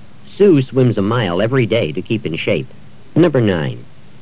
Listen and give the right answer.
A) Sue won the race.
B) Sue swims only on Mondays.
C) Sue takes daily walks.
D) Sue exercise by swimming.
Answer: D) Sue exercise by swimming.

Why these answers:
Sue swims a mile every day to keep in shape.

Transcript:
7. This trip will be shorter on the subway than on the bus.
8. Sue swims a mile every day to keep in shape.